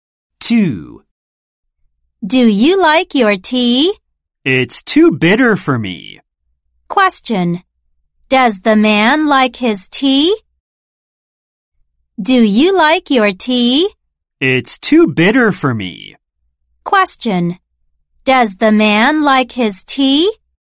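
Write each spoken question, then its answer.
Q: Does the man like his tea?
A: No, it's too bitter.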